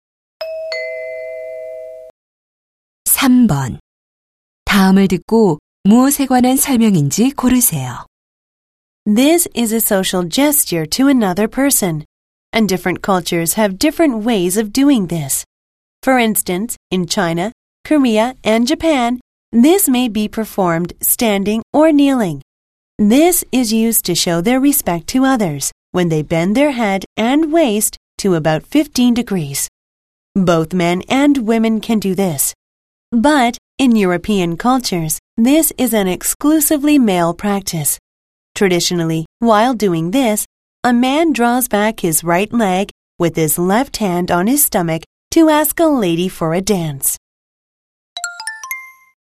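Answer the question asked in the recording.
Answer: 절(인사, 허리 굽혀 하는 인사)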